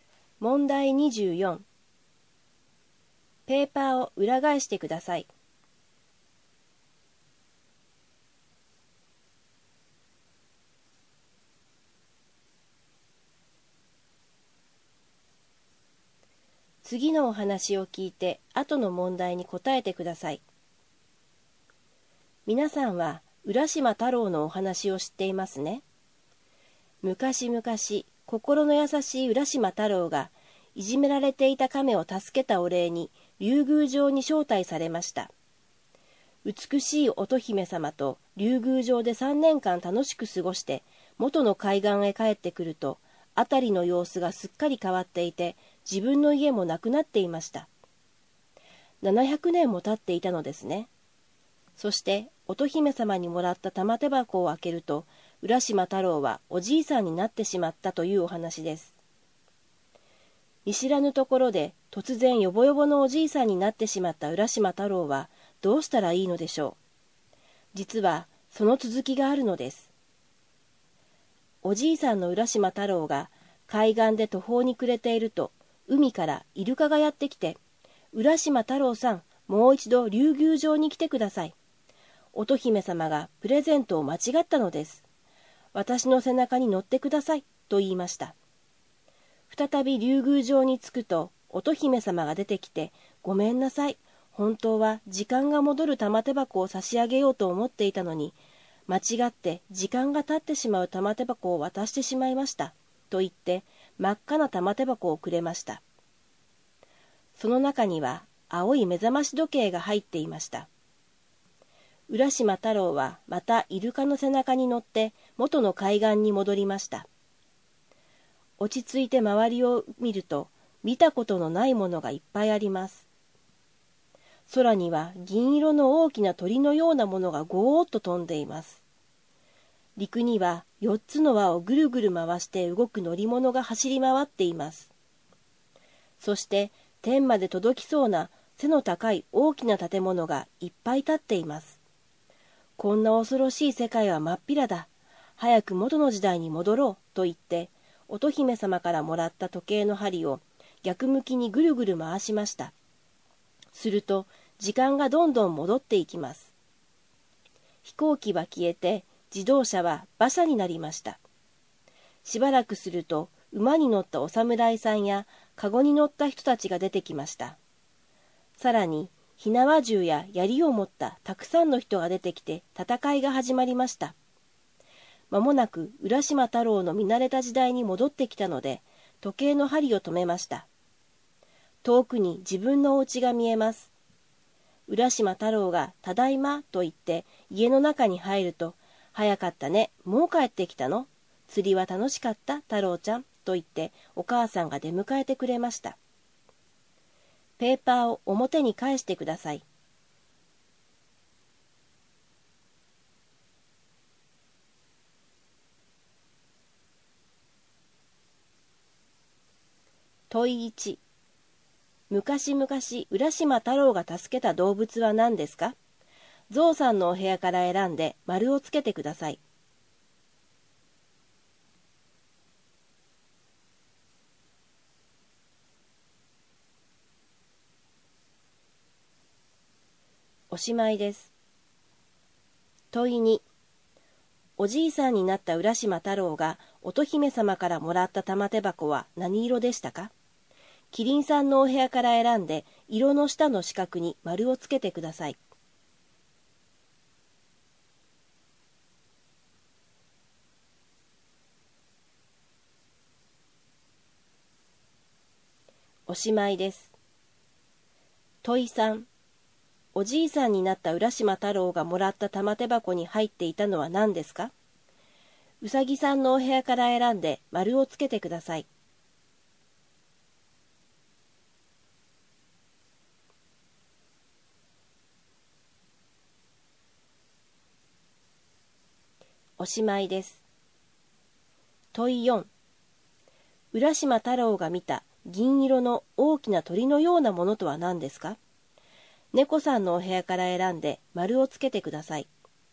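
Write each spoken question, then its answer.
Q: おじいさんになった浦島太郎がもらった玉手箱に入っていたのは何ですか?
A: 青い目覚まし時計

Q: 浦島太郎が見た銀色の大きな鳥のようなものとは何ですか?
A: 飛行機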